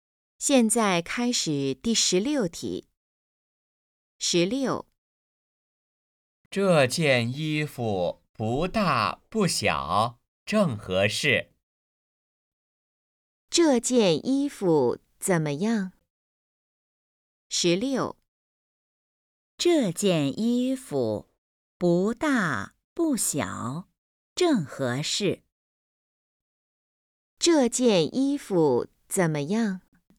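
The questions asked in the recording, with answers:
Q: 这件衣服怎么样?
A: 不大不小,正合适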